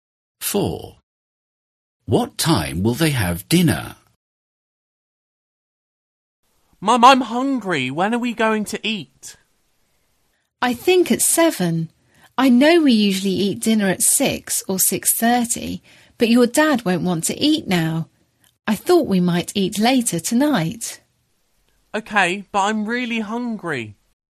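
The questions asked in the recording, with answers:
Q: What time will they have dinner?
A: at 7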